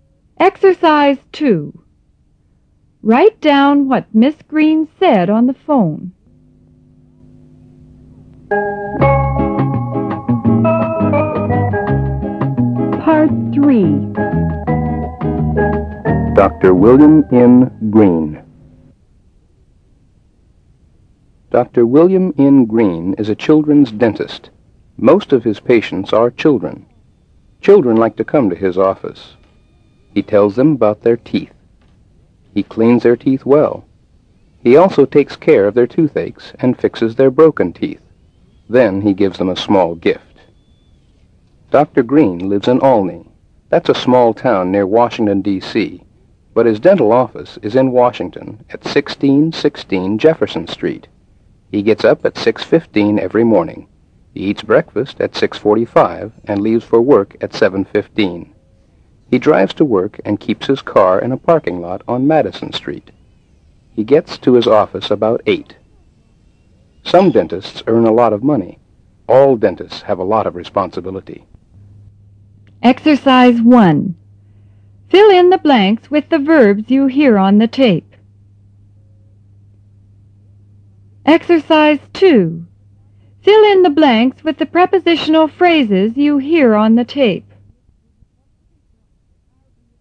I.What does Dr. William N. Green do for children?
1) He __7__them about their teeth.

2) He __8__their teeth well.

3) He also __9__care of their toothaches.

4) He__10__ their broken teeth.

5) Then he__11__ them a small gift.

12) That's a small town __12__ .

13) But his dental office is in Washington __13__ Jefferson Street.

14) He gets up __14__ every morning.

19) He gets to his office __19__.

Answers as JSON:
{"1": "tells", "2": "cleans", "3": "takes", "4": "fixes", "5": "gives", "12": "Washington D.C.", "13": "1616", "14": "at 6:15", "19": "about 8"}

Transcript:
Dr. William N. Green (1′)
Dr. William N. Green is a children's dentist. Most of his patients are children. Children like to come to his office. He tells them about their teeth. He cleans their teeth well He also takes care of their toothaches and fixes their broken teeth. Then he gives them a small gift.
Dr. Green lives in Olney. That's a small town near Washington, D. C. But his dental office is in Washington at 1616 Jefferson Street, He gets up at 6∶15 every morning. He eats breakfast at 6∶45 and leaves for work at 7∶15. He drives to work and keeps his car in a parking lot on Madison Street. He gets to his office about 8∶00.
Some dentists earn a lot of money; all dentists have a lot of responsibility.